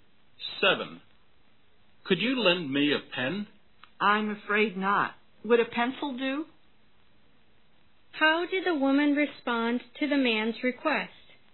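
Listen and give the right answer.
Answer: She couldn't lend a pen but offered a pencil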